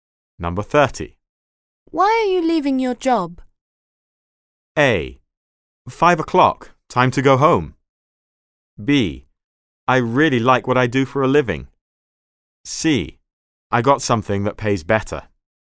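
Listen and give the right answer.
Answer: C: I got something that pays better.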